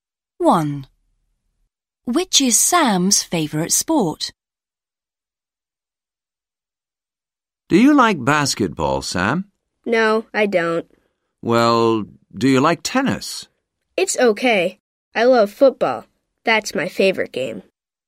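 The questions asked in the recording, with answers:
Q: Which is Sam's favourite sport?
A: football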